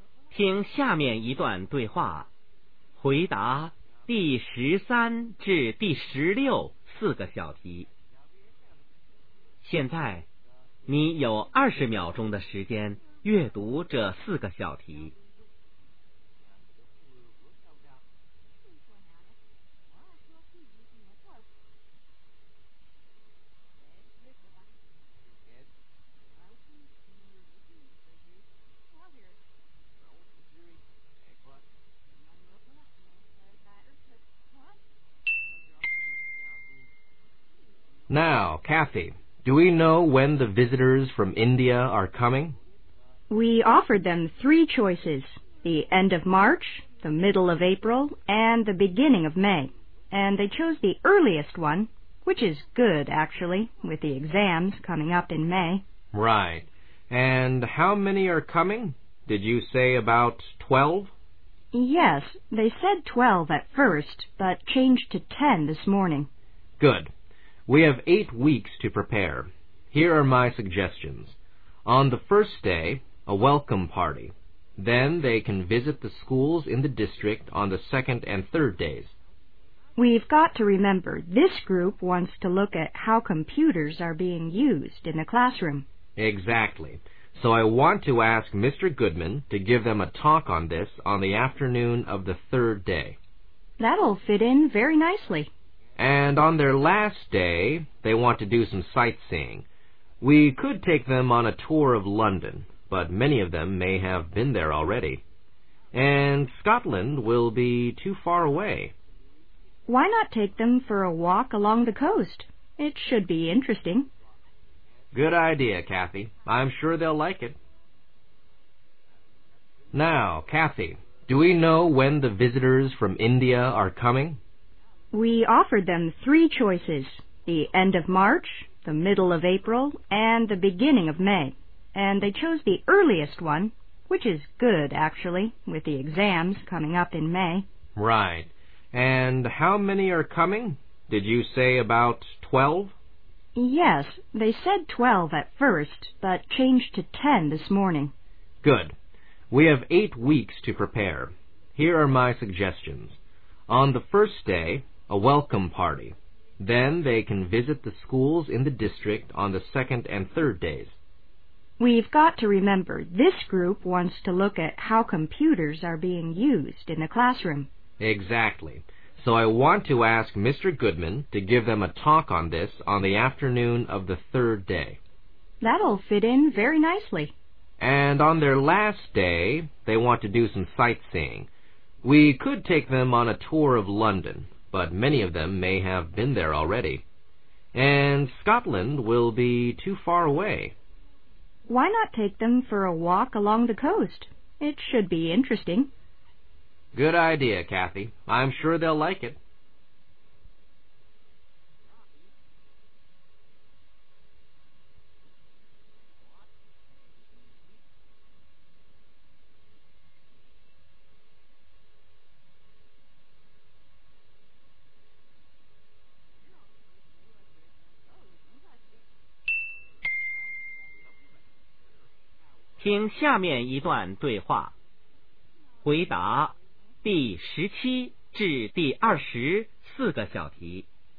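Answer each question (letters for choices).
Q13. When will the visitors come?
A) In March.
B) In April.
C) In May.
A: A

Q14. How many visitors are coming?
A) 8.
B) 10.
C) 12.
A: B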